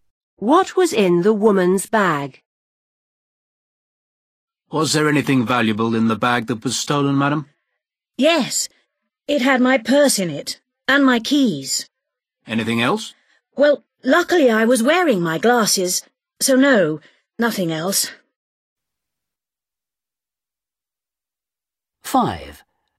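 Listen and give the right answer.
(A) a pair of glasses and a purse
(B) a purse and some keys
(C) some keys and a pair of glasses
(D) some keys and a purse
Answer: (B) a purse and some keys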